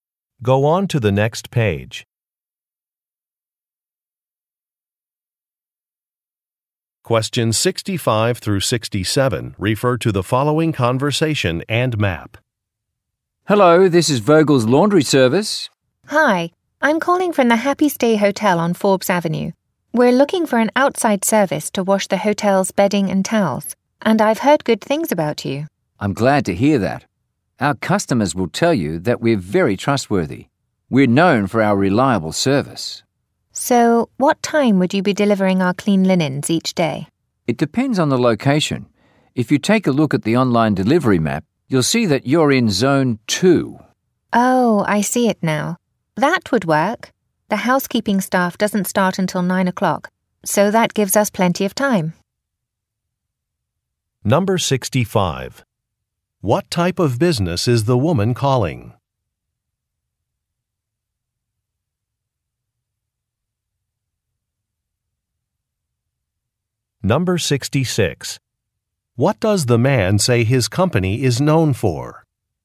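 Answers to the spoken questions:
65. A laundry service
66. Reliable service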